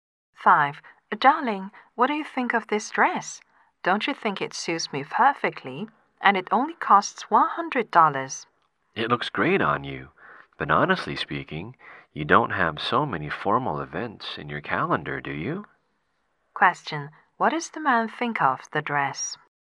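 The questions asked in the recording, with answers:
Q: What does the man think of the dress?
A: It looks great but she doesn't really need it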